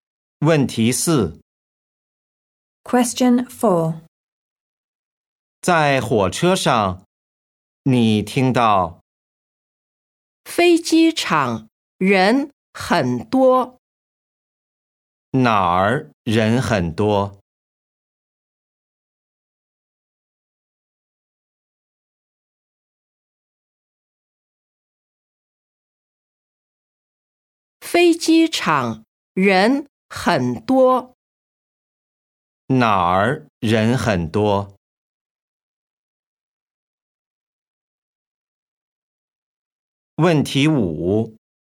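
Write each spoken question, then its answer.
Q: 哪儿人很多?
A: 飞机场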